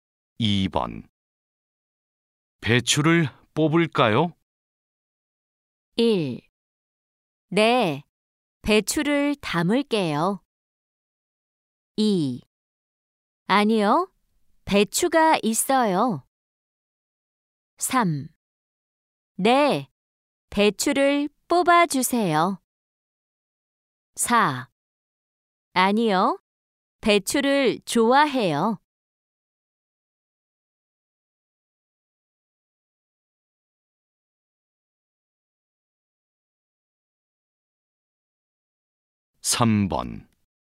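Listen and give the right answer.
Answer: 3: 네, 배추를 뽑아주세요.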